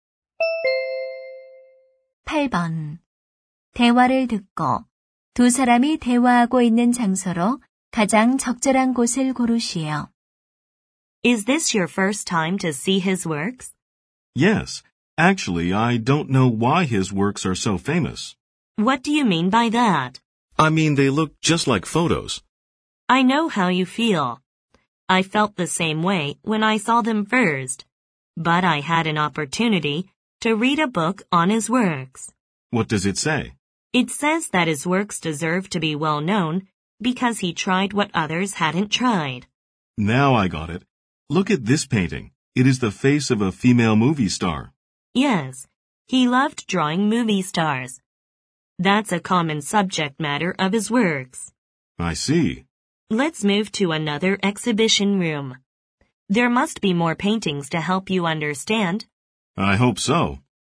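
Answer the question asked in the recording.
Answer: 미술관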